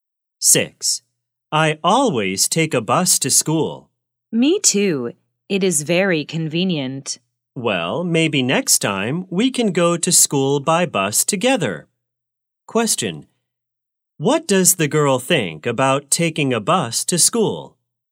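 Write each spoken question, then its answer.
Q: Question, what does the girl think about taking a bus to school?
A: It is very convenient.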